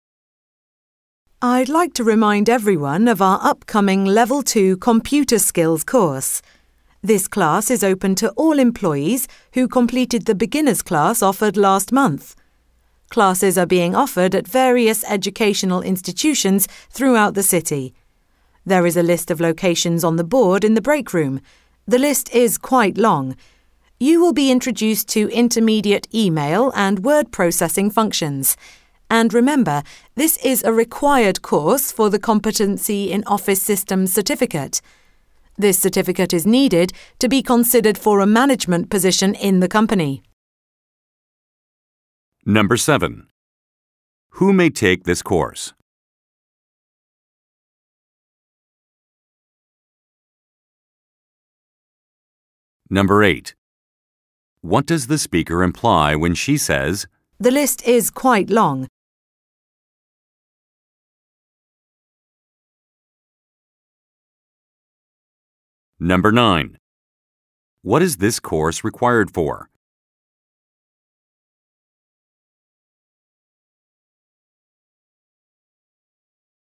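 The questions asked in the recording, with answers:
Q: Who may take this course?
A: Employees who completed last month's beginner's class

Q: What is this course required for?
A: The Competency in Office Systems certificate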